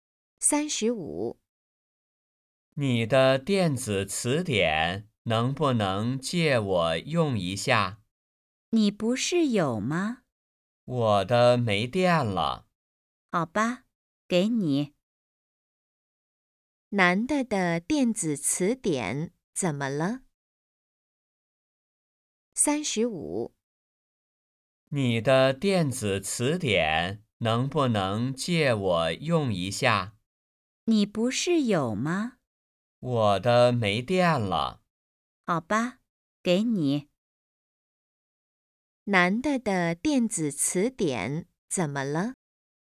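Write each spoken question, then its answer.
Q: 男的的电子词典怎么了?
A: 没电了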